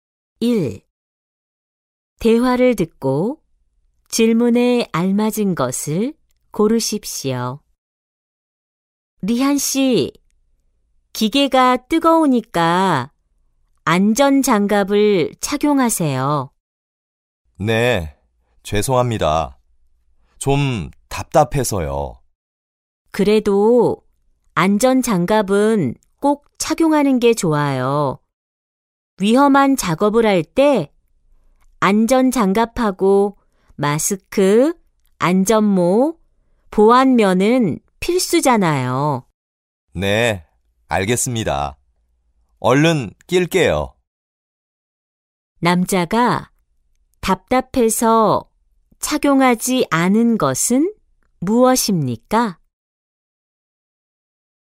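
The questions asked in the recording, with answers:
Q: 남자가 답답해서 착용하지 않은 것은 무엇입니까?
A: 안전장갑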